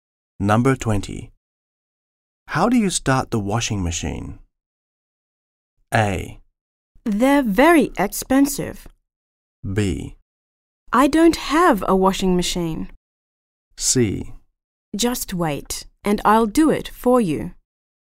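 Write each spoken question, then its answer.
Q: How do you start the washing machine?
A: C: Just wait, and I'll do it for you.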